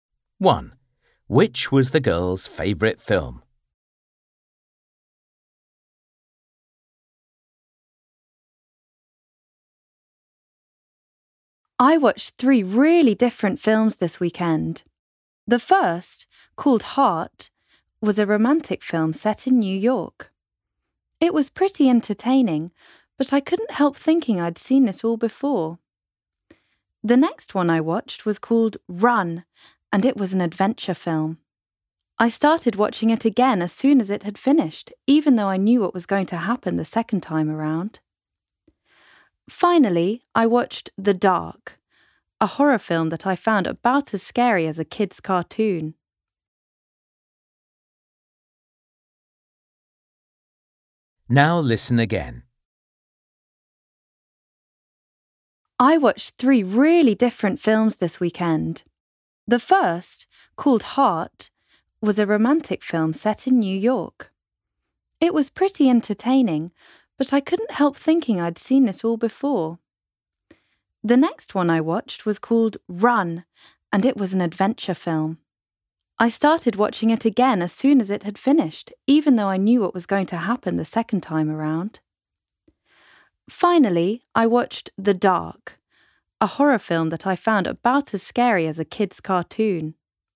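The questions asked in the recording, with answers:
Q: Which was the girl's favourite film?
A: Run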